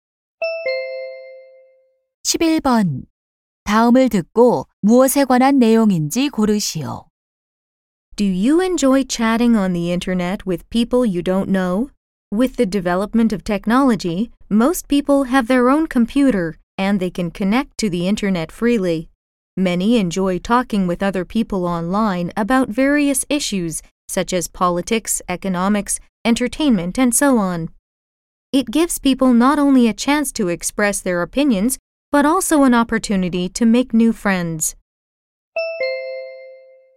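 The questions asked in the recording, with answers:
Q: 다음을 듣고 무엇에 관한 내용인지 고르시오.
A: 인터넷 채팅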